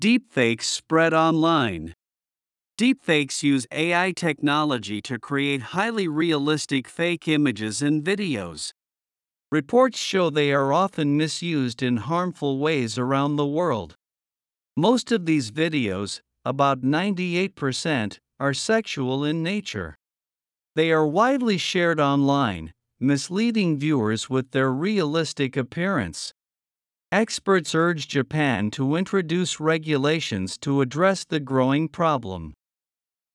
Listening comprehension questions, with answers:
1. Deepfakes use AI technology to ( ).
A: create highly realistic fake images and videos

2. Reports show they are often ( ).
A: misused in harmful ways around the world

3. They are widely shared online, ( ).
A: misleading viewers with their realistic appearance

次の各質問の答えを探しながら聞きましょう。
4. How do deepfakes confuse viewers?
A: Their realistic appearance makes it difficult to distinguish them.

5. Where are deepfakes widely shared?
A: They are widely shared online.

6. Who is urging Japan to regulate deepfakes?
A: Experts are urging Japan to regulate them.

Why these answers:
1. ディープフェイクには画像と動画があるため、ここは並列であるべきです。「動画の中の画像」は意味が不自然です。 and」と「in」は弱音ではほぼ同じ音に聞こえるため、意味で聞き分ける読解力が必要です。
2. 「misused in」というリンキングのせいで少し難易度が上がります。まずは単語をしっかり覚えましょう。
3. 「their」は直前に言及された「deepfakes」を指し、その所有を示しています。「the」にすると、特定のディープフェイクの外見という文脈があいまいになります。 また、ここでの「appearance」は「見た目・外観」という抽象的な概念を表す不可算名詞です。

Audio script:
Deepfakes Spread Online
Deepfakes use AI technology to create highly realistic fake images and videos.
Reports show they are often misused in harmful ways around the world.
Most of these videos, about 98 percent, are sexual in nature.
They are widely shared online, misleading viewers with their realistic appearance.
Experts urge Japan to introduce regulations to address the growing problem.

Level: 中級脱出